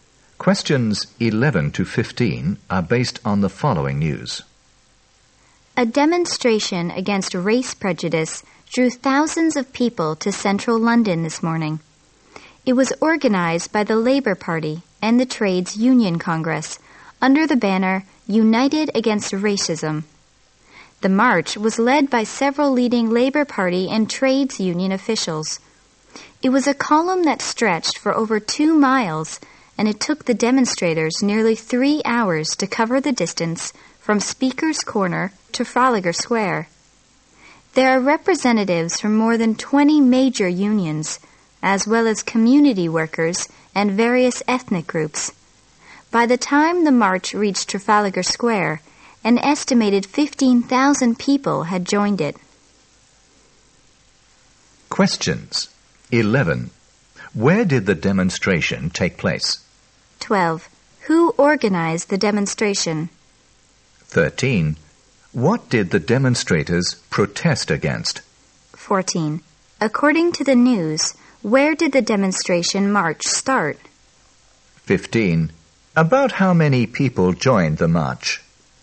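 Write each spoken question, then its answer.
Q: Where did the demonstration take place?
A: In central London

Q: Who organized the demonstration?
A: The Labour Party and the Trades Union Congress

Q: What did the demonstrators protest against?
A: Race prejudice (racism)

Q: According to the news, where did the demonstration march start?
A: At Speaker's Corner

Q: About how many people joined the march?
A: About 15,000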